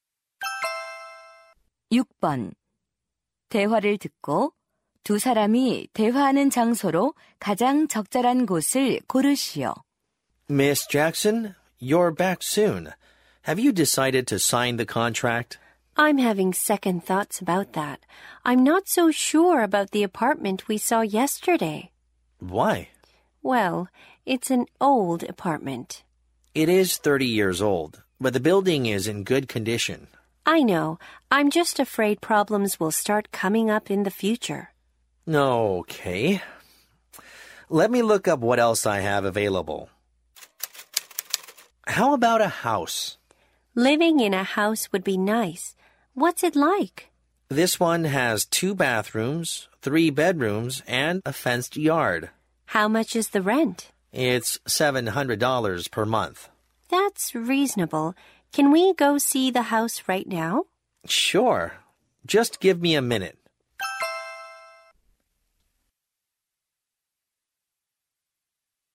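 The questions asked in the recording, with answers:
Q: 대화를 듣고 두 사람이 대화하는 장소로 가장 적절한 곳을 고르시오.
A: 부동산 중개소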